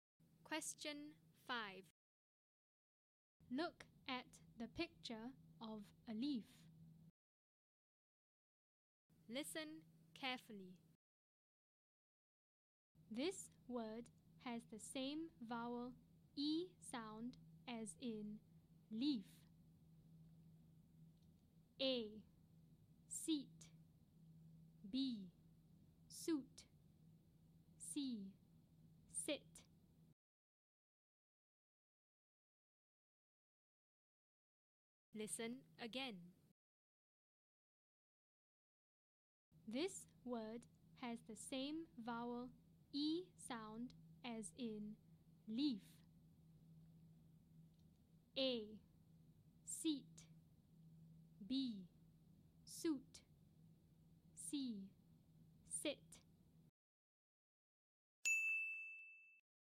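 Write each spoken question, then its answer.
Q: This word has the same vowel E sound as in leaf.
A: A: Seat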